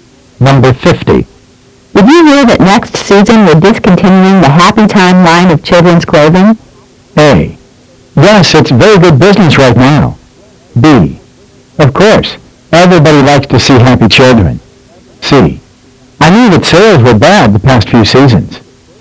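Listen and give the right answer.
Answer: C: I knew that sales were bad the past few seasons.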